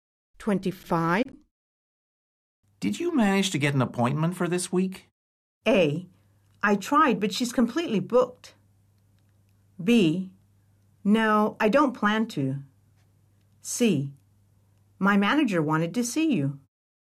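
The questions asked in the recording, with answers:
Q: Did you manage to get an appointment for this week?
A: A: I tried, but she's completely booked.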